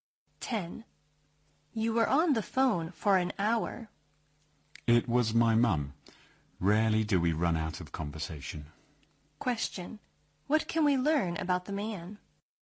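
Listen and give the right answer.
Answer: He and his mum always have a lot to talk about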